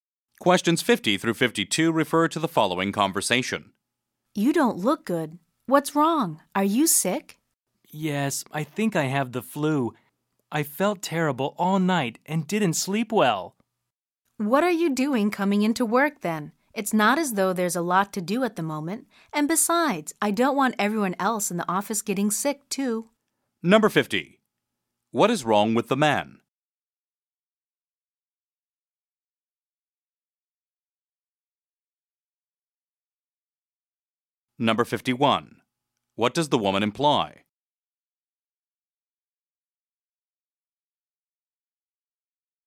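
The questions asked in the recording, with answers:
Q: What is wrong with the man?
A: He has the flu

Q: What does the woman imply?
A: The man should have stayed home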